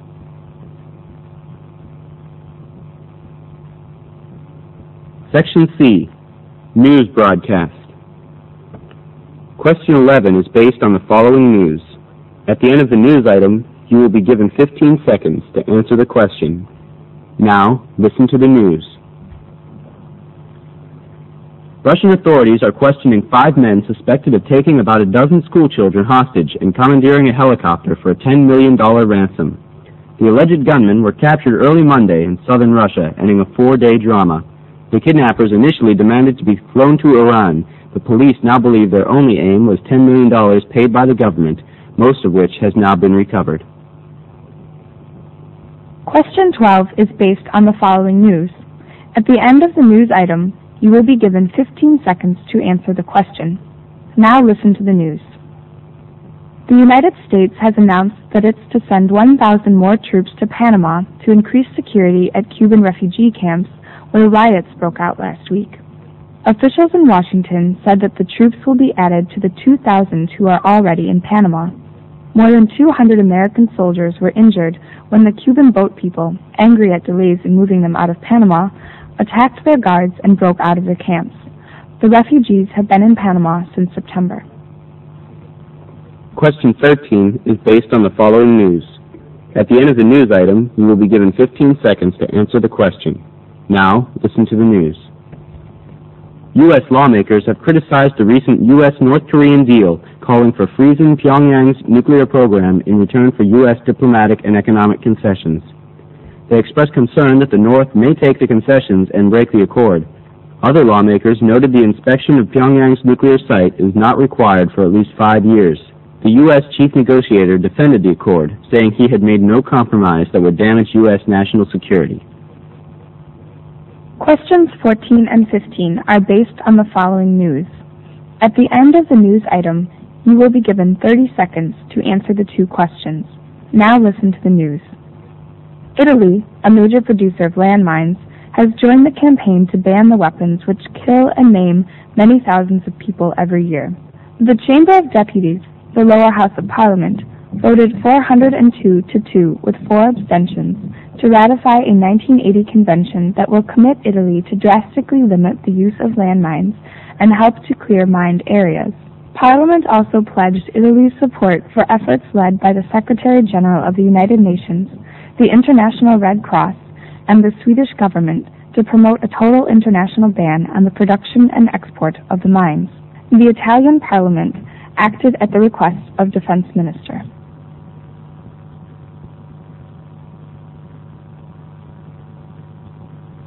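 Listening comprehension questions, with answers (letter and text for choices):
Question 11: Which of the following statements is TRUE?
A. Five gunmen were flown to Iran in a helicopter.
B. Most of the ransom was retrieved in the end.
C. The children were held for five days.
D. The authorities have passed sentence on the gunmen.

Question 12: According to the news, American troops in Panama ___.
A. were attacked at refugee camps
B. were angry at delays in departure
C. attacked Cuban refugee camps last week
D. will be increased to 2,000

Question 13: Which of the following statements is CORRECT? U.S. lawmakers ___.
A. challenged the accord for freezing Pyongyang's nuclear program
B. required the inspection of Pyongyang' s nuclear site for at least five years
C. were worried that North Korea may take advantage of the concessions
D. blamed the U. S. negotiator for making no compromises with North Korea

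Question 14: According to the news, the Italian Parliament was asked to act by ___.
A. the U.N.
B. the Red Cross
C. the Defense Minister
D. the Swedish Government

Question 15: On the issue of limited use of landmines, the Italian Parliament is ___.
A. noncommittal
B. resolute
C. unsupportive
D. wavering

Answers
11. B. Most of the ransom was retrieved in the end.
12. A. were attacked at refugee camps
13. C. were worried that North Korea may take advantage of the concessions
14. C. the Defense Minister
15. B. resolute

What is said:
Russian authorities are questioning five men suspected of taking about a dozen school children hostage and commandeering a helicopter for a ten million dollar ransom. The alleged gunmen were captured early Monday in southern Russia ending a four-day drama. The kidnappers initially demanded to be flown to Iran. A police now believes their only aim was ten million dollars paid by the government most of which has now been recovered.
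News Item 2 ( For Question 12 )
The United States has announced that it's to send one thousand more troops to Panama to increase security at Cuban refugee camps where riots broke out last week. Officials in Washington said that the troops will be added to the two thousand who are already in Panama. More than 200 American soldiers were injured when the Cubans, angry at delays in moving them out of Panama, attacked their guards and broke out of the camps. The refugees have been in Panama since September.
News Item 3 ( For Question 13 )
U.S. lawmakers have criticized- the recent US-North Korean deal calling for freeing Pyongyang's nuclear program in return for US diplomatic and economic concessions. They express concern that the North may take the concessions and break the accord. Other lawmakers noted that inspection of Pyongyang's nuclear site is not required for at least five years. The U. 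S. chief negotiator defended the accord, saying he had made no compromises that would damage U. S. national security.
News Item 4 ( For Questions 14-15 )
Italy, a major producer of landmines, has joined the campaign to ban the weapons which kill and maim many thousands of people every year. The Chamber of Deputies, the Lower House of Parliament voted 402 to 2 with four abstentions to ratify a 1980 convention that will commit Italy to drastically limit the use of landmines and help to clear mined areas. Parliament also pledged Italy's support for efforts led by the Secretary General of the United Nations, the International Red Cross and the Swedish Government to promote a total international ban on the production and export of the mines. The Italian Parliament acted at the request of Defense Minister.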